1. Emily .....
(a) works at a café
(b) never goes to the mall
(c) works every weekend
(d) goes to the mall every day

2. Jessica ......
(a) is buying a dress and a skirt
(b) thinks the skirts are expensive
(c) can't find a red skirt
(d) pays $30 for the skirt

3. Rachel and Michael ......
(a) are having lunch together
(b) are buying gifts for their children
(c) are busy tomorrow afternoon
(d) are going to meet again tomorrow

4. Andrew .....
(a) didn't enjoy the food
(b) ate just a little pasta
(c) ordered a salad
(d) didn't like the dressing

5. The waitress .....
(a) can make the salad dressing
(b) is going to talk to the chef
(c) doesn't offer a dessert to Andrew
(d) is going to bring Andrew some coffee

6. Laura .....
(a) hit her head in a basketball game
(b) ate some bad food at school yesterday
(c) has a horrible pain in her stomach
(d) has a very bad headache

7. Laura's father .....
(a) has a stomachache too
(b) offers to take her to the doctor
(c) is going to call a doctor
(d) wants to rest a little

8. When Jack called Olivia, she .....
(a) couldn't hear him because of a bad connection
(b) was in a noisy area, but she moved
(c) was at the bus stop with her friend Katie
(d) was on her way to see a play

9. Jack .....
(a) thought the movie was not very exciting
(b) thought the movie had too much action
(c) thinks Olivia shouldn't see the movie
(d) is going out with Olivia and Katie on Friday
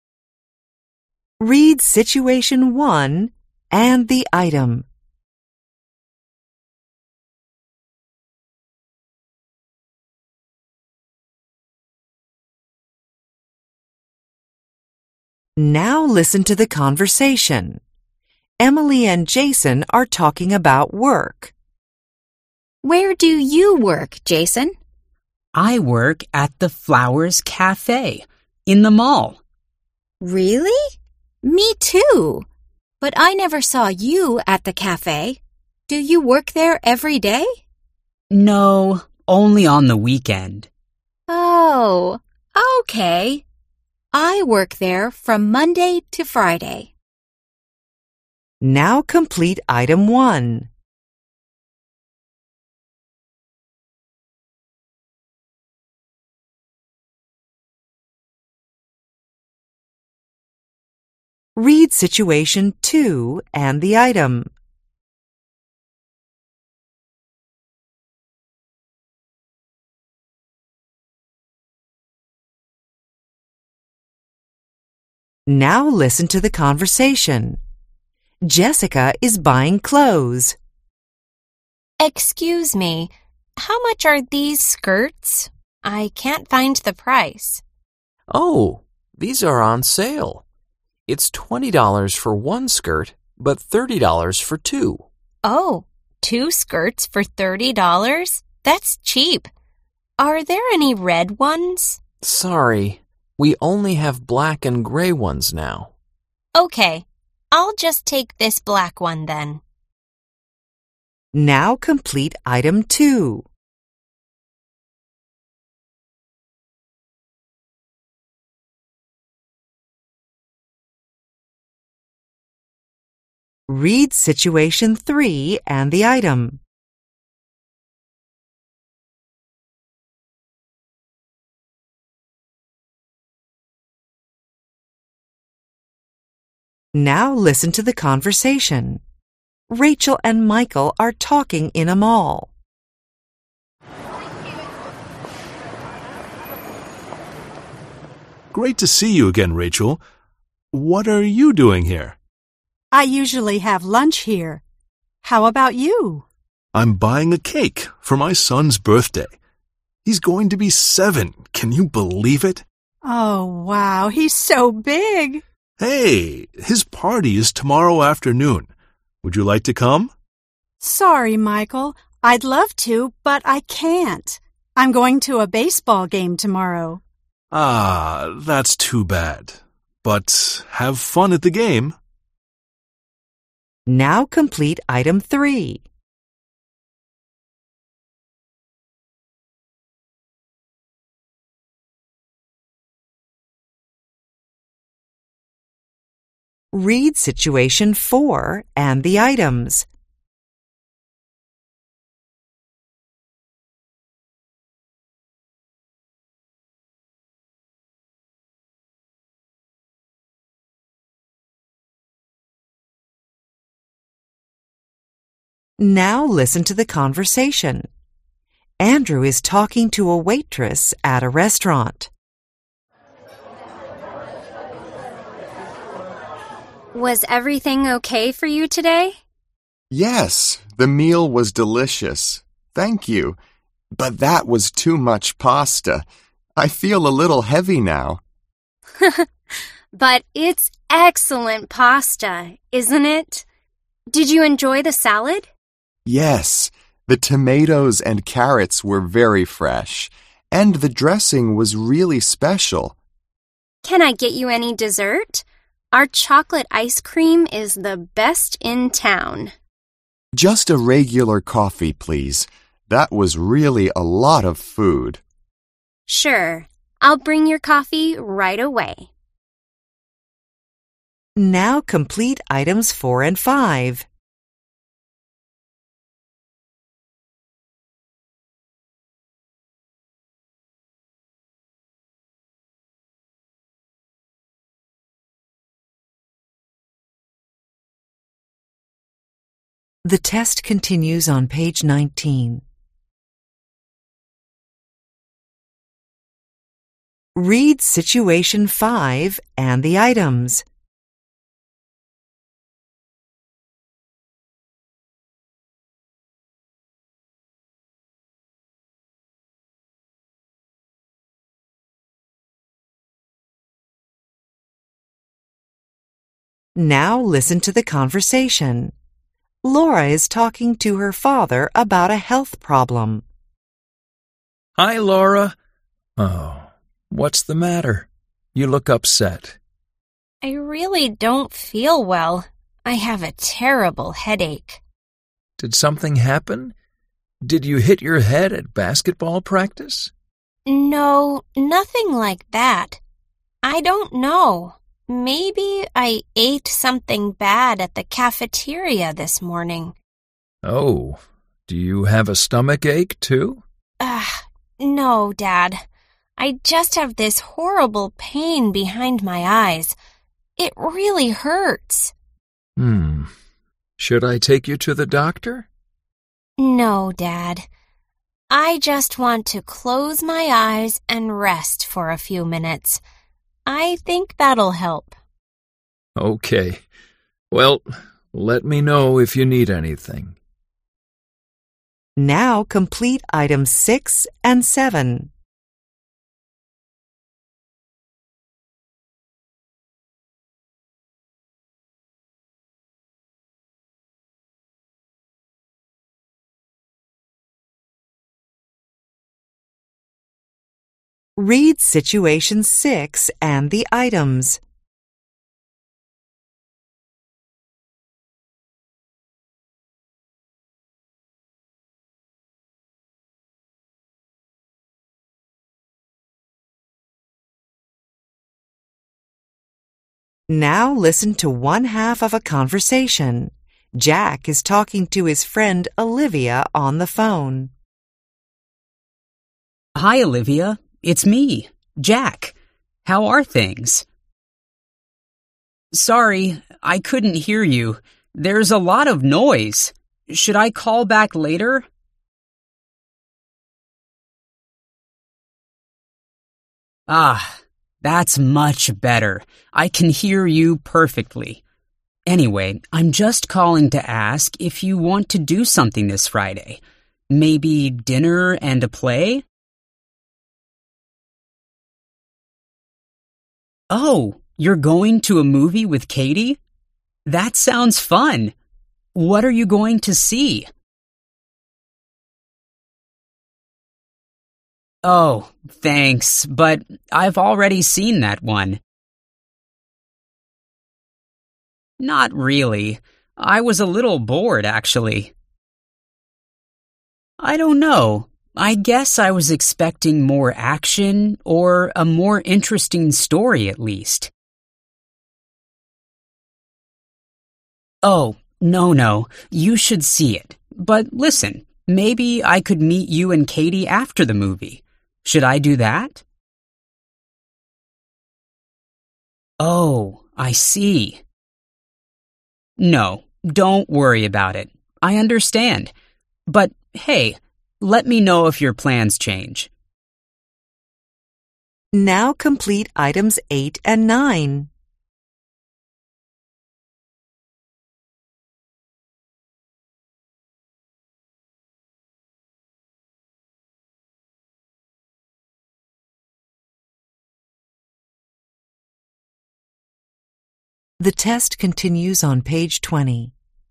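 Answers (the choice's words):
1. works at a café
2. can't find a red skirt
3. are busy tomorrow afternoon
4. ordered a salad
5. is going to bring Andrew some coffee
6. has a very bad headache
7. offers to take her to the doctor
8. was in a noisy area, but she moved
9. thought the movie was not very exciting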